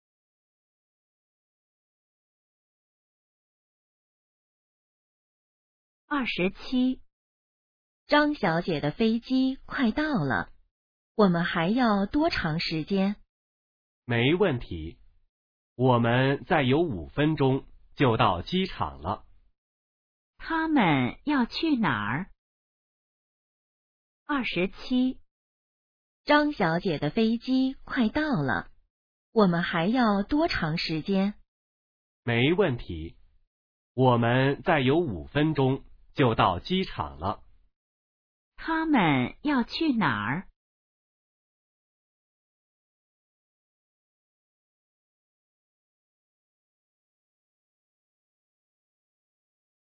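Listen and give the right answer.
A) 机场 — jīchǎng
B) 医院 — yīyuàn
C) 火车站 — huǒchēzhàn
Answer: A) 机场 — jīchǎng

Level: HSK2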